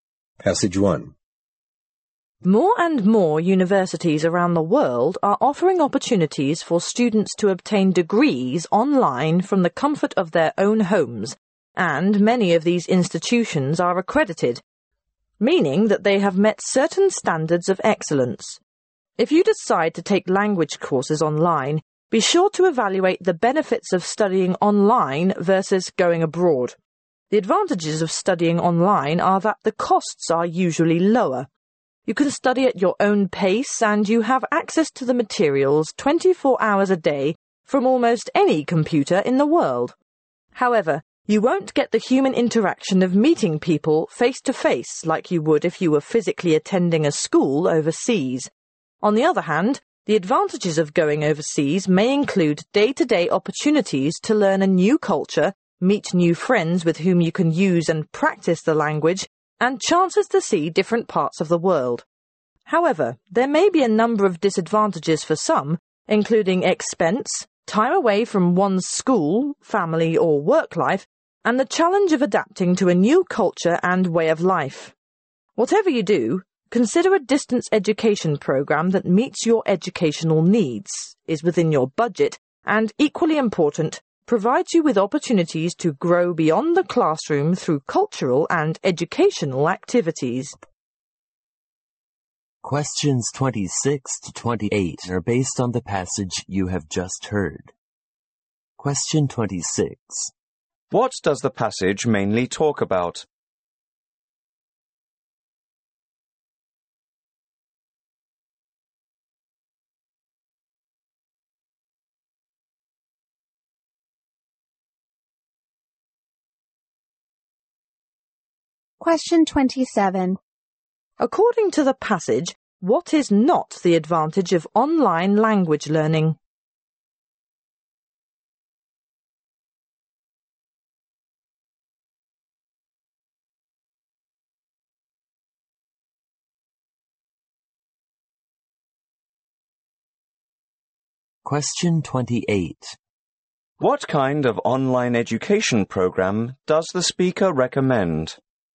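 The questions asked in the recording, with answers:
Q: What does the passage mainly talk about?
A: Studying online versus studying abroad

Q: What kind of online education program does the speaker recommend?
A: One that meets your needs, fits your budget and offers growth beyond the classroom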